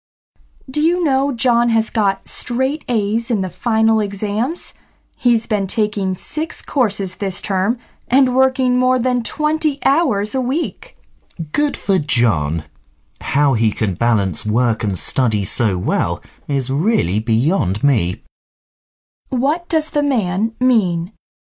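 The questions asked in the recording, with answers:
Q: What does the man mean?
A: He can't understand how John balances work and study so well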